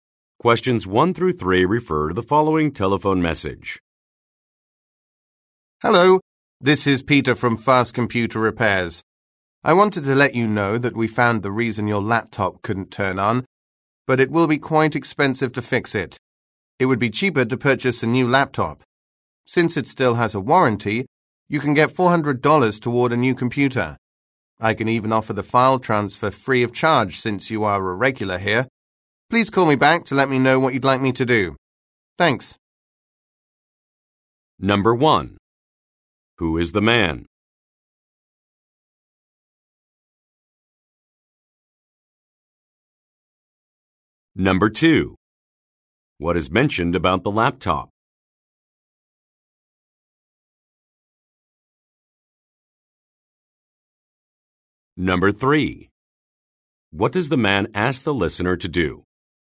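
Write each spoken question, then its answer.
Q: Who is the man?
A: A computer repair technician.

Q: What does the man ask the listener to do?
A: Call him back.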